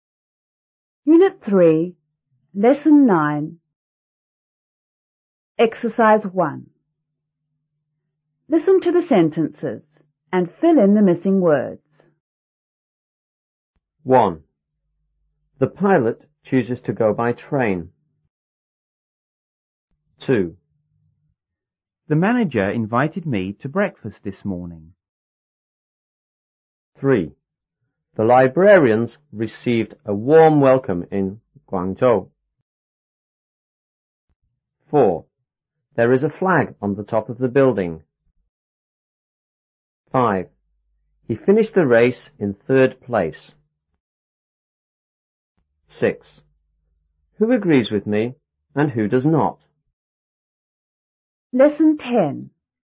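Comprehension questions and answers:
1.Listen to the sentences and fill in the missing words.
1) The pilot _ to go by__.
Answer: chooses / train

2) The manager _ me to __this morning.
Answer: invited / breakfast

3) The librarians _ a warm _ in Guangzhou.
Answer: received / welcome

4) There is a flag on the _ of the __.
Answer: top / building

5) He finished the _ in third __.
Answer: race / place

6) Who _ _ me and who does not?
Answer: agrees with

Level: 初中英语广州版5B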